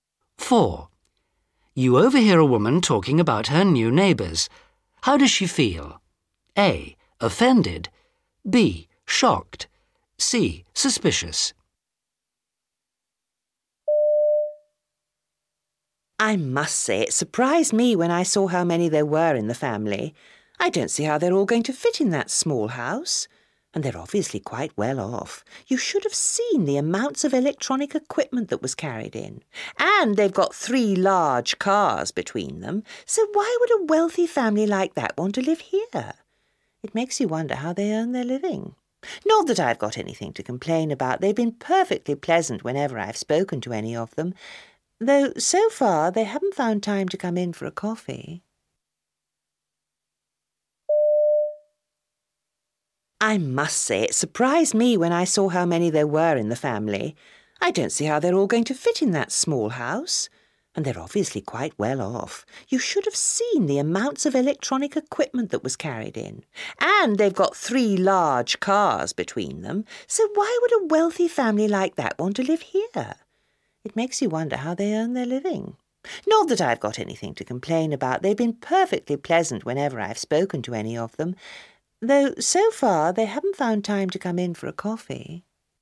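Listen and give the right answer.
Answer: C: Suspicious.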